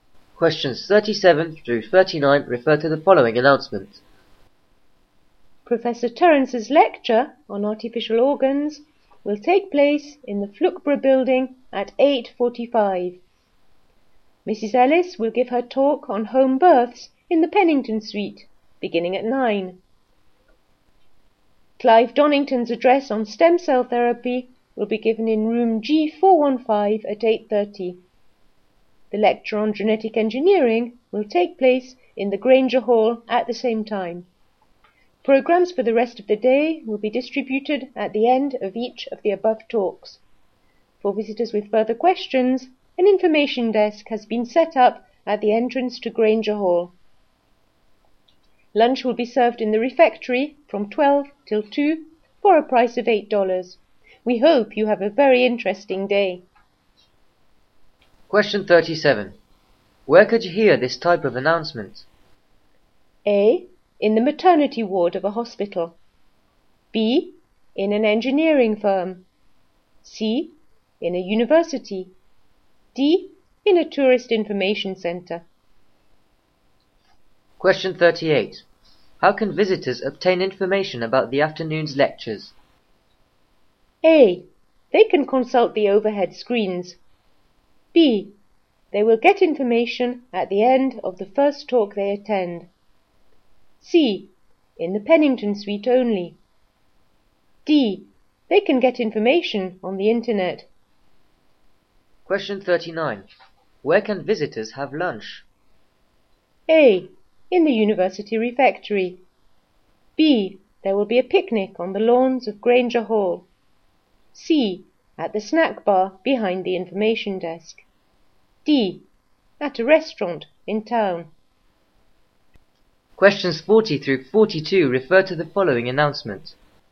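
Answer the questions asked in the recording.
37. C: In a university.
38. B: They will get information at the end of the first talk they attend.
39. A: In the university refectory.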